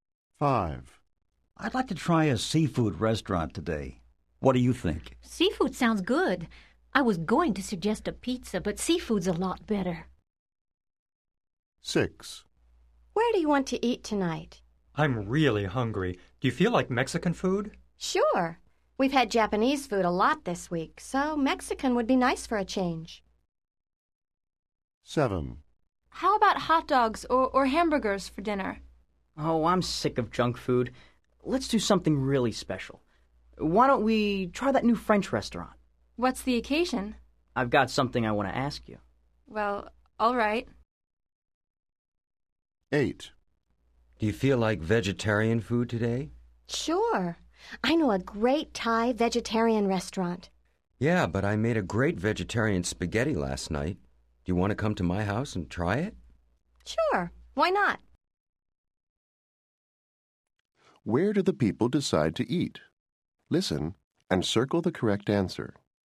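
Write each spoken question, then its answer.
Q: Where do the people decide to eat?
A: A seafood restaurant

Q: Where do the people decide to eat?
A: A Mexican restaurant

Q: Where do the people decide to eat?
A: The new French restaurant

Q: Where do the people decide to eat?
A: At one speaker's house (vegetarian spaghetti)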